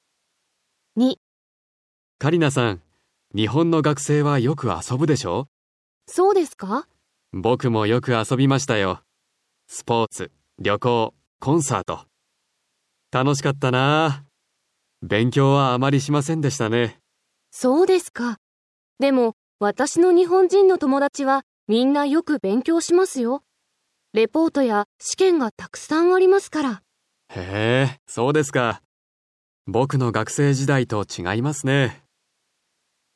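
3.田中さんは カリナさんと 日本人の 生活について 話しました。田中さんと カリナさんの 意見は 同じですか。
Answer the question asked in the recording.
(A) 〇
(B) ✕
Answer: ✕

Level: Cơ bản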